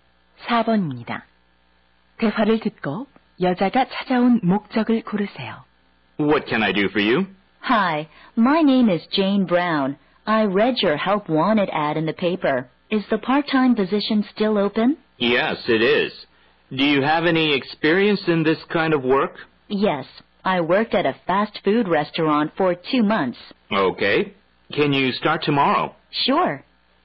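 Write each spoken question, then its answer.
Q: 대화를 듣고 여자가 찾아온 목적을 고르세요.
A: 아르바이트 지원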